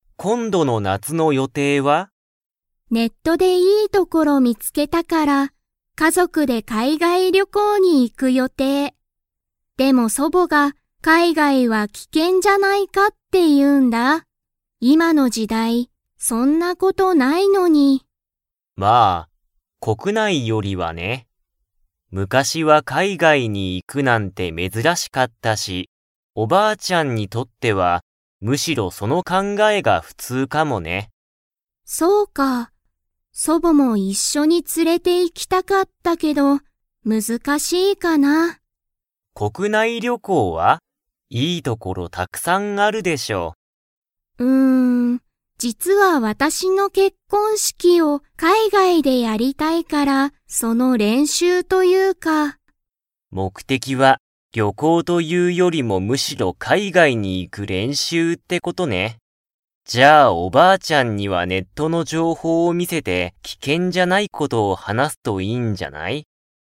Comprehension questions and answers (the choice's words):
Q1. 誰だれが、海外かいがいは危険きけんだと言いっていますか?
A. サワさん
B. サワさんの母かあさん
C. セキさんの彼氏かれし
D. サワさんの祖母そぼ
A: サワさんの祖母そぼ

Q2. サワさんは、海外かいがいで結婚式けっこんしきを 。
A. したい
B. したくない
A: したい

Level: Level 4